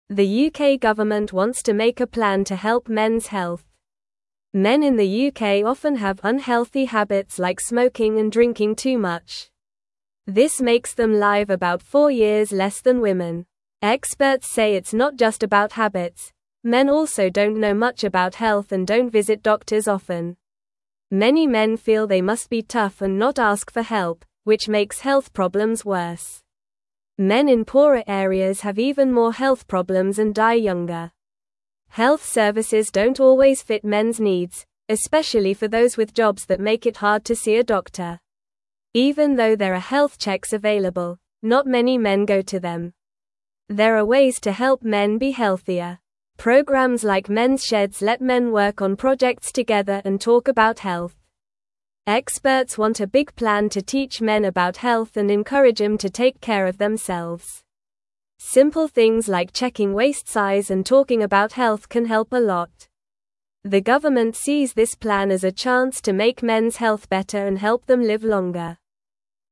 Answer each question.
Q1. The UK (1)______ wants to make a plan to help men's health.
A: government

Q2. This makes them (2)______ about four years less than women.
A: live

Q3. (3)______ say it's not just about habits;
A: Experts

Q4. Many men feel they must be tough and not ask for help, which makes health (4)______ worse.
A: problems

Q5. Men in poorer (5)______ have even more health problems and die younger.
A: areas

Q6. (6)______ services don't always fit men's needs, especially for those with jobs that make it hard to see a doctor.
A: Health

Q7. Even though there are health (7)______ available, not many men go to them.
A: checks

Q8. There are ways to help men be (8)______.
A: healthier

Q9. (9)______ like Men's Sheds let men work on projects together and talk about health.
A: Programs

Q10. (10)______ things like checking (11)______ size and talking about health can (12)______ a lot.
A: Simple

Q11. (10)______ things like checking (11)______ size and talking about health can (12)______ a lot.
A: waist

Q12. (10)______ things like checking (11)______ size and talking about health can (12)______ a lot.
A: help

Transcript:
The UK government wants to make a plan to help men's health. Men in the UK often have unhealthy habits like smoking and drinking too much. This makes them live about four years less than women. Experts say it's not just about habits; men also don't know much about health and don't visit doctors often.
Many men feel they must be tough and not ask for help, which makes health problems worse. Men in poorer areas have even more health problems and die younger. Health services don't always fit men's needs, especially for those with jobs that make it hard to see a doctor. Even though there are health checks available, not many men go to them.
There are ways to help men be healthier. Programs like Men's Sheds let men work on projects together and talk about health. Experts want a big plan to teach men about health and encourage them to take care of themselves. Simple things like checking waist size and talking about health can help a lot. The government sees this plan as a chance to make men's health better and help them live longer.

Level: Level 2